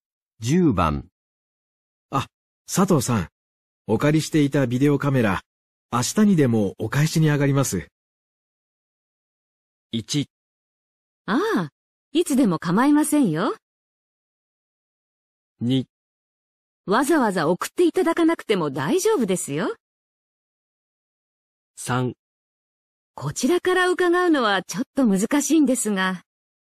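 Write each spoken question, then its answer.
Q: あ、佐藤さん、お借りしていたビデオカメラ、明日にでもお返しに上がります。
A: 1: ああ、いつでも構いませんよ。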